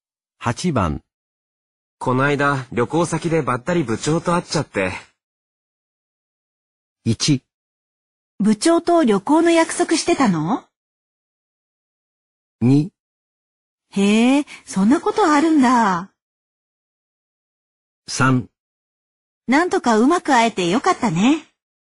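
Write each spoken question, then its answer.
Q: こないだ旅行先でばったり部長と会っちゃって。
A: 2: へえ、そんなことあるんだ。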